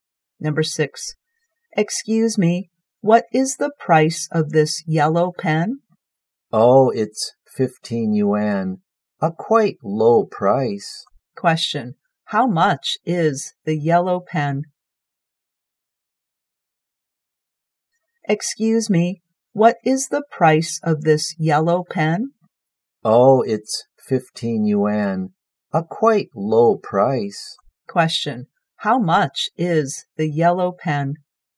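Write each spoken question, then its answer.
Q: Question.How much is the yellow pen?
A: 15 yuan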